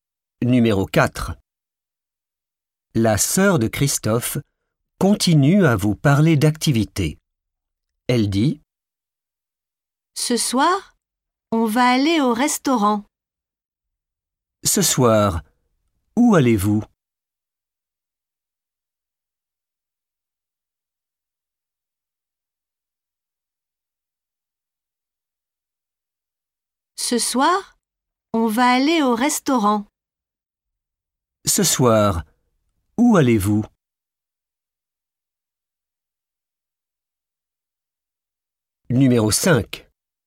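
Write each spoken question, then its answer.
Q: Ce soir, où allez-vous?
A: au restaurant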